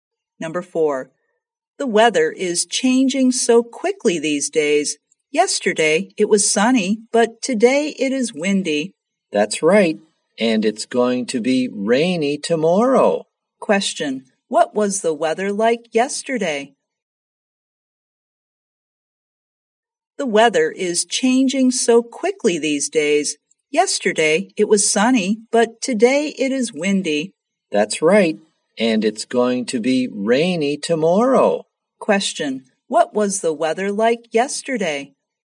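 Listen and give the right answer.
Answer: Sunny.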